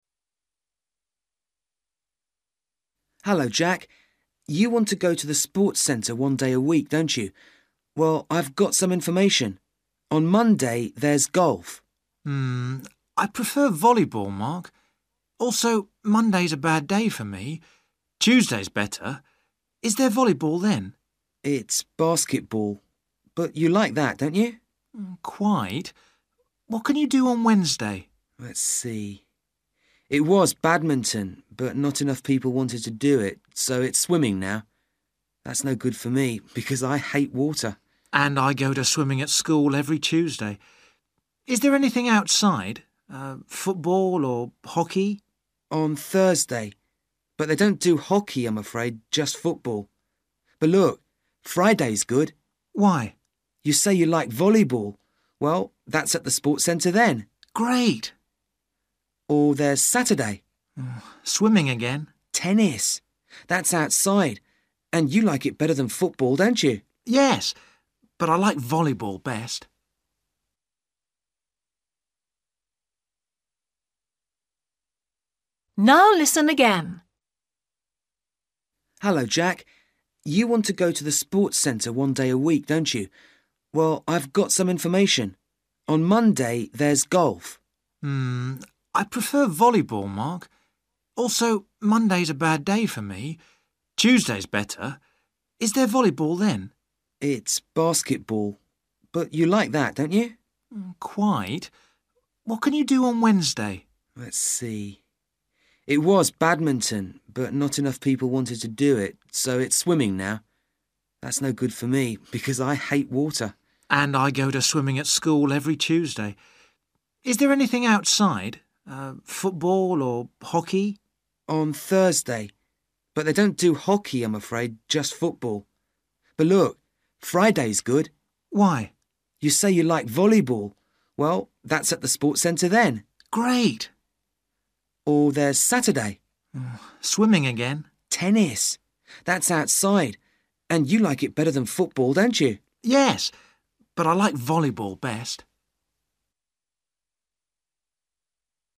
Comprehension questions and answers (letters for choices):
For questions 6-10, write a letter A-H next to each day.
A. badminton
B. basketball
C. football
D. golf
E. hockey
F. swimming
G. tennis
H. volleyball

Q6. Tuesday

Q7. Wednesday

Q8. Thursday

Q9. Friday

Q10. Saturday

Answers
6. B
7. F
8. C
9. H
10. G

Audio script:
Mark: Hello, Jack. You want to go to the sports centre one day a week, don't you? Well, I've got some information. On Monday there's golf.
I prefer volleyball, Mark. Also, Monday's a bad day for me. Tuesday's better. Is there volleyball then?
Mark: It's basketball, but you like that, don't you?
Jack: Quite. What can you do on Wednesday?
Mark: Let's see. It was badminton, but not enough people wanted to do it so it's swimming now. That's no good for me because I hate water.
Jack: And I go to swimming at school every Tuesday. Is there anything outside? Football or hockey?
Mark: On Thursday. But they don't do hockey, I'm afraid, just football. But look, Friday is good.
Jack: Why?
Mark: You say you like volleyball. Well, that's at the sports centre then.
Jack: Great.
Mark: Or there's Saturday.
Jack: Swimming again?
Mark: Tennis. That's outside and you like it better than football, don't you?
Jack: Yes, but I like volleyball best.

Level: A2